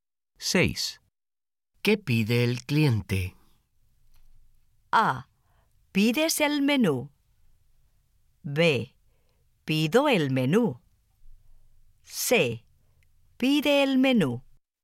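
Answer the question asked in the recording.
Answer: C: Pide el menú.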